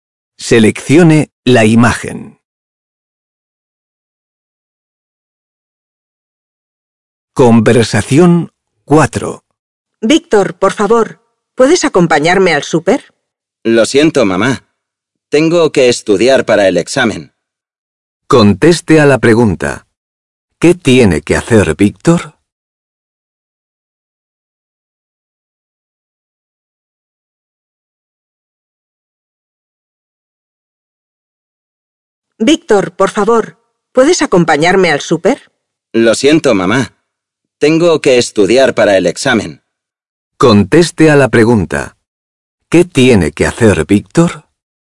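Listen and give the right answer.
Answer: Estudiar para el examen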